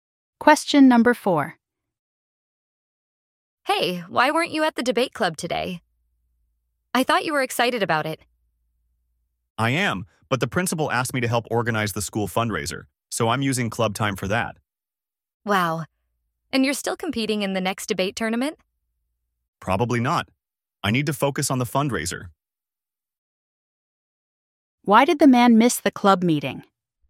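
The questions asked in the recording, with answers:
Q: Why did the man miss the club meeting?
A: He was helping organize the school fundraiser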